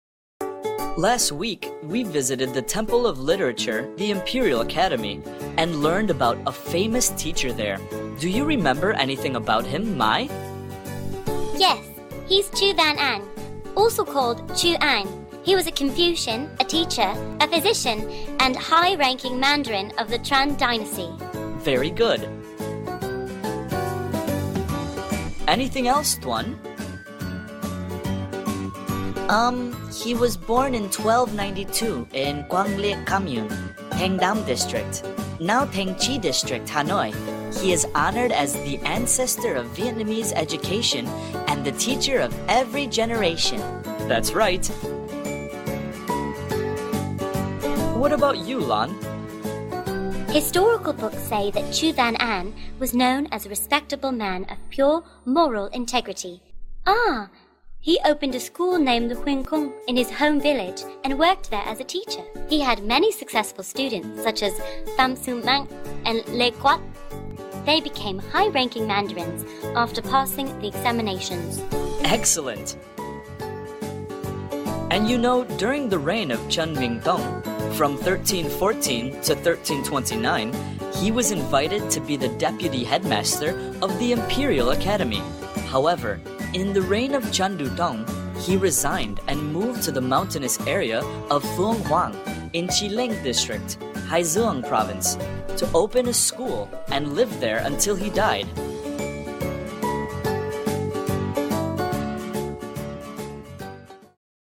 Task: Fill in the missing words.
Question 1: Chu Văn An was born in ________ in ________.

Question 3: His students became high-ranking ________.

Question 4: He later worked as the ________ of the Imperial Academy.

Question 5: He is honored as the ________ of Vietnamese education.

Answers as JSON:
{"1": "1292; Hanoi", "3": "mandarins", "4": "deputy headmaster", "5": "ancestor"}

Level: lớp 7